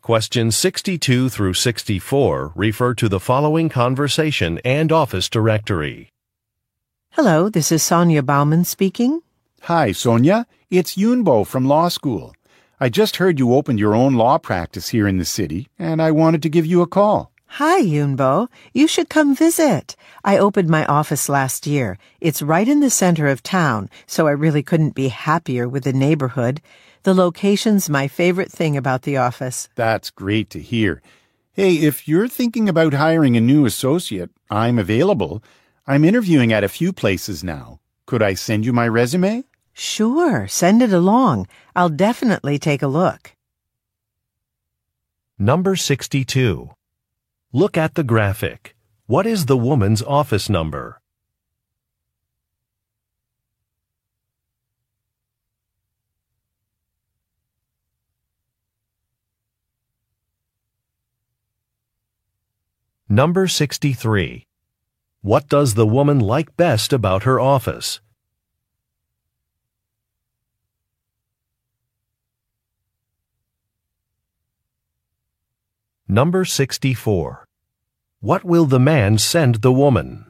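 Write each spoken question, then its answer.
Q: What does the woman like best about her office?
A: Its location in the center of town

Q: What will the man send the woman?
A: His resume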